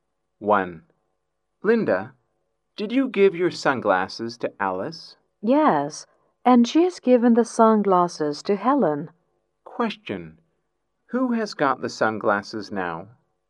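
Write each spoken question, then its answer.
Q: Who has got the sunglasses now?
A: Helen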